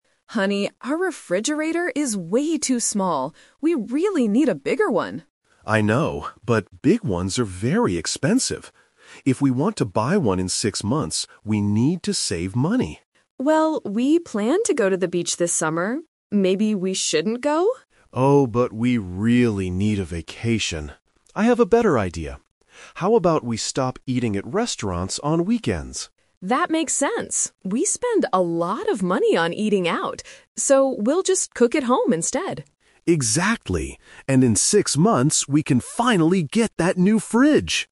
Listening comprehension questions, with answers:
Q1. What do they want to buy in six months?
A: A new refrigerator

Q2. Why do they need a new refrigerator?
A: Their old one is too small.

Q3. How will they save money for the purchase?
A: By cooking at home on weekends.

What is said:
Wife: Honey, our refrigerator is way too small. We really need a bigger one.
Husband: I know, but big ones are very expensive. If we want to buy one in six months, we need to save money.
Wife: Well, we planned to go to the beach this summer. Maybe we shouldn't go?
Husband: Oh, but we really need a vacation. I have a better idea. How about we stop eating at restaurants on weekends?
Wife: That makes sense. We spend a lot of money on eating out. So, we'll just cook at home instead.